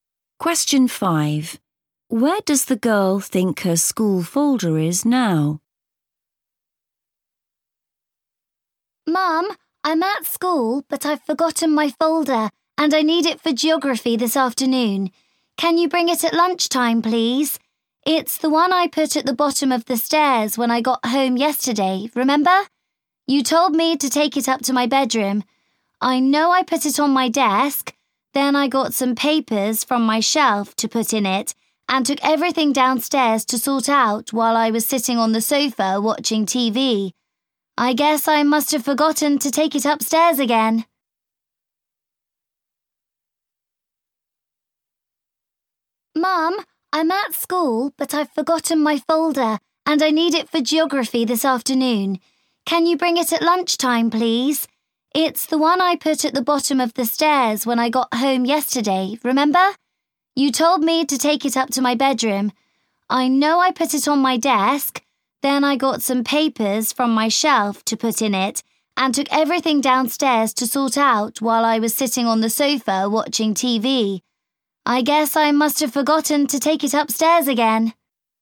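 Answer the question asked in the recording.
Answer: Downstairs, by the sofa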